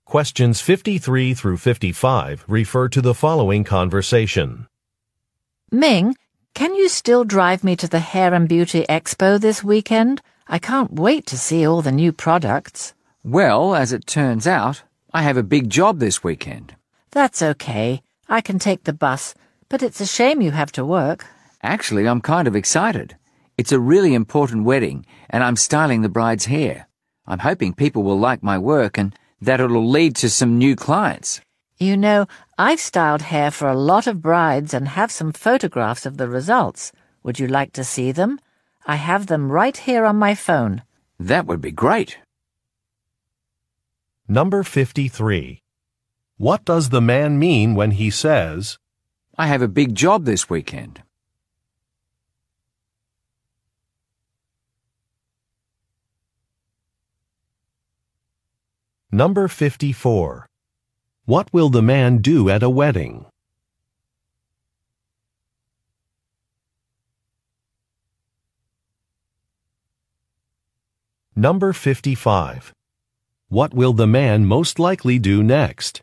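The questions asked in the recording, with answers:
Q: What does the man mean when he says, I have a big job this weekend?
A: He can't drive the woman to the expo

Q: What will the man do at a wedding?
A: Style the bride's hair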